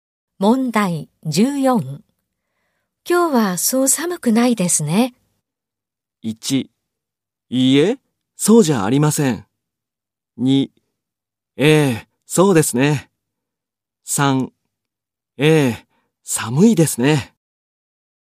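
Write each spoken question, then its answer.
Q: 今日はそう寒くないですね。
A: 2: ええ、そうですね。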